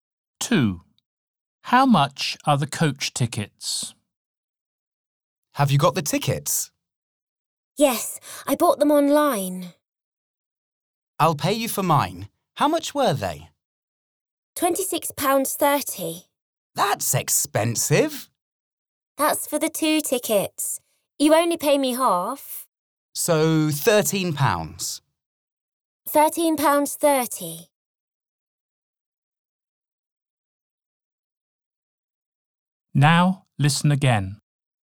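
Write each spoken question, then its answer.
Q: How much are the coach tickets?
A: £13.30 each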